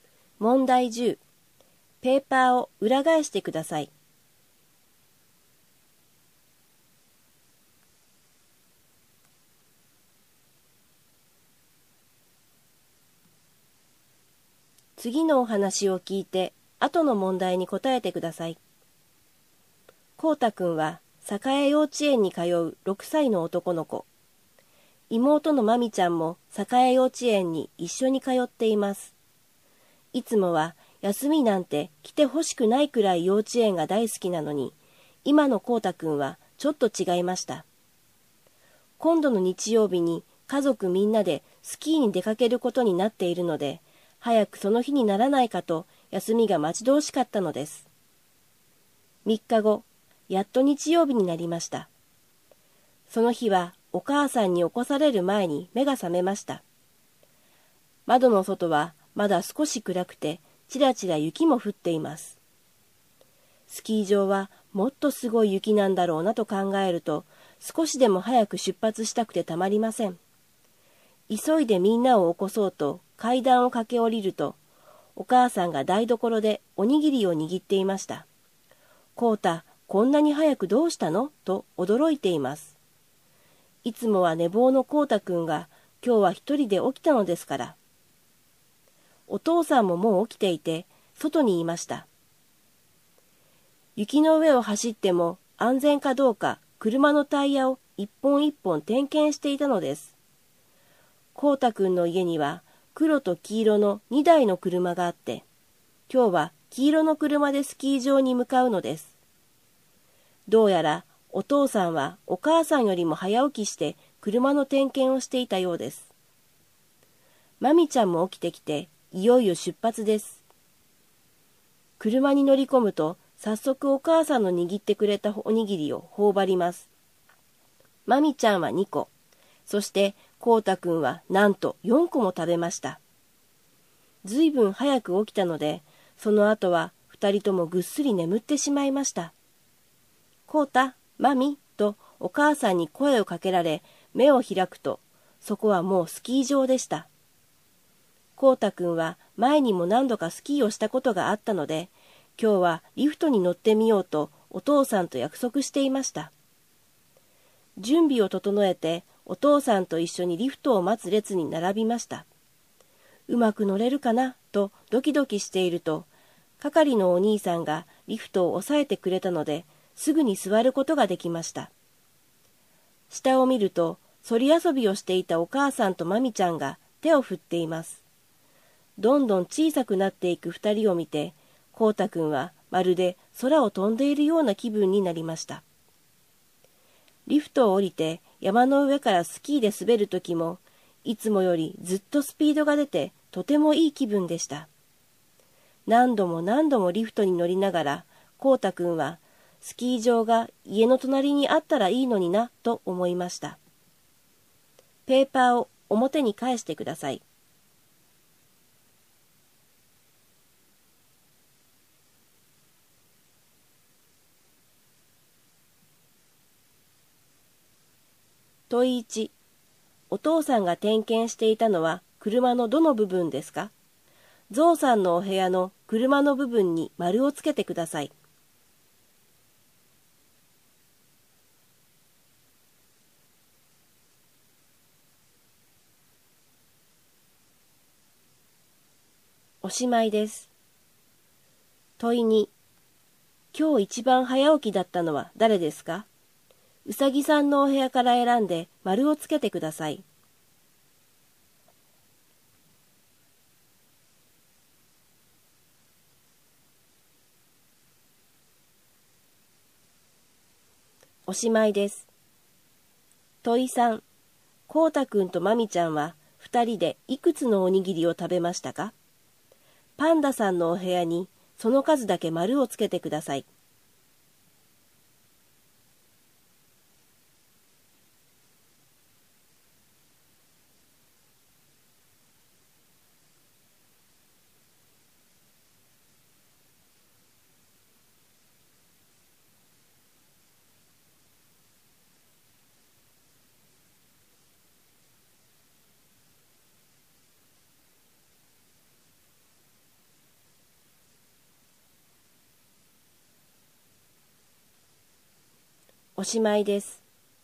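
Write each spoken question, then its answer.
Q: お父さんが点検していたのは車のどの部分ですか?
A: タイヤ

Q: 今日一番早起きだったのは誰ですか?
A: お父さん

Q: こうたくんとまみちゃんは2人でいくつのおにぎりを食べましたか?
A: 6個

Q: スキー場でコウタくんはどんなことをしましたか?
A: リフトに乗ってスキーで滑った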